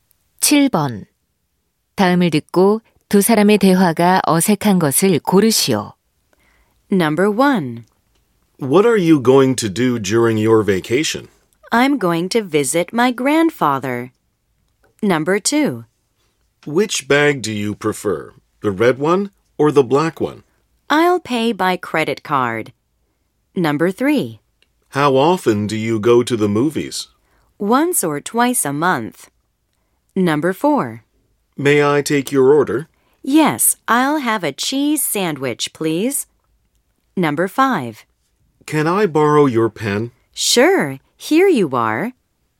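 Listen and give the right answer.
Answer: 2: Which bag do you prefer, the red one or the black one? / I'll pay by credit card.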